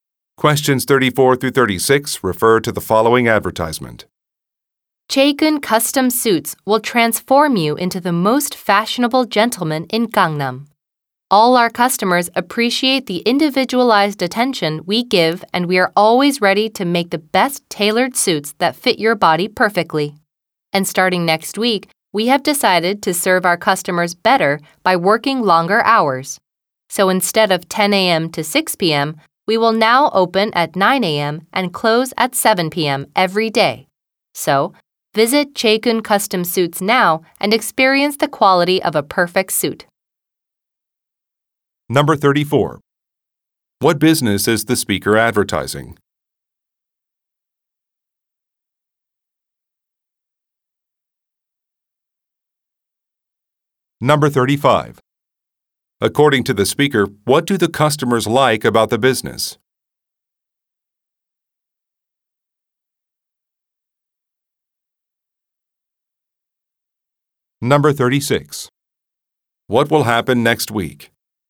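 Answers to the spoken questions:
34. A custom suit tailor
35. The individualized attention
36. Business hours will be extended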